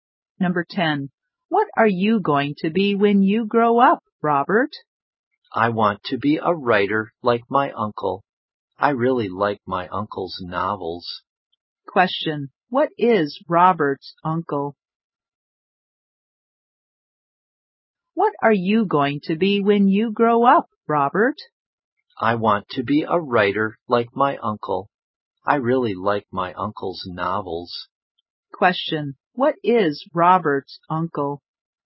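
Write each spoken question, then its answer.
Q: Question, what is Robert's uncle?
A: A writer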